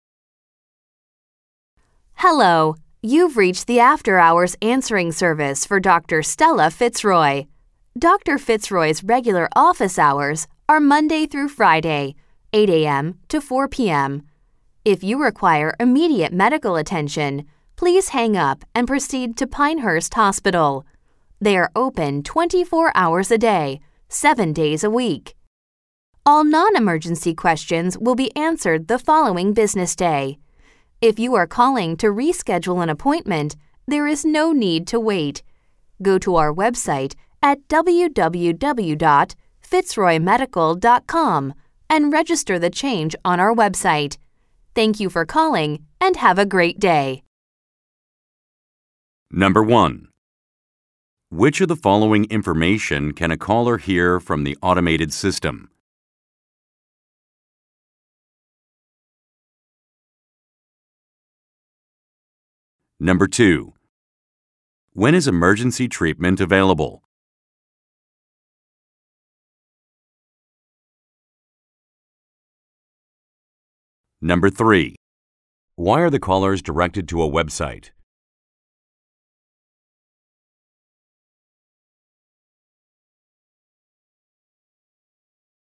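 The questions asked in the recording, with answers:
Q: When is emergency treatment available?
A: 24 hours a day, 7 days a week, at Pinehurst Hospital

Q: Why are the callers directed to a website?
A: To reschedule an appointment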